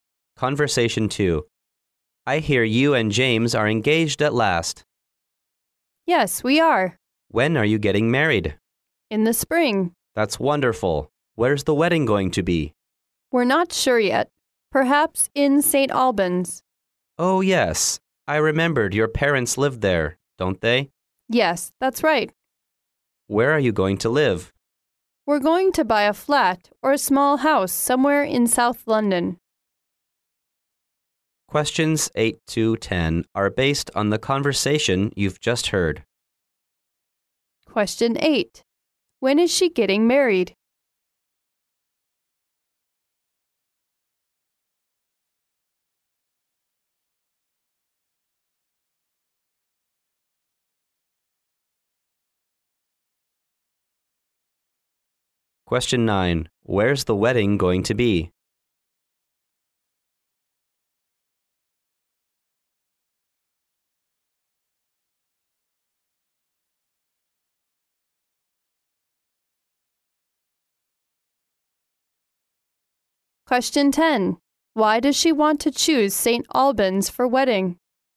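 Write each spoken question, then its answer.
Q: When is she getting married?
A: In the spring

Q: Where's the wedding going to be?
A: Perhaps in St. Albans

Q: Why does she want to choose St. Albans for wedding?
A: Her parents live there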